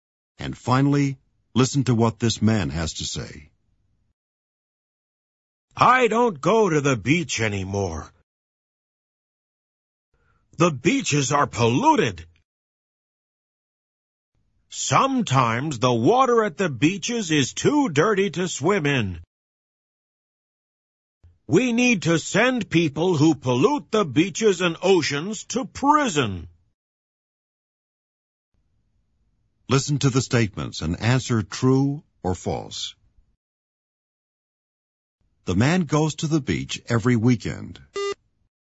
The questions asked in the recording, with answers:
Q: The man goes to the beach every weekend.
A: False. He doesn't go to the beach anymore.